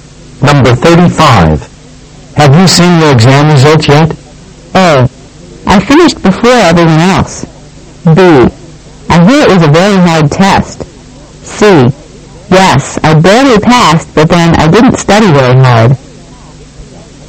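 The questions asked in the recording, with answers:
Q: Have you seen your exam results yet?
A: C: Yes, I barely passed, but then I didn't study very hard.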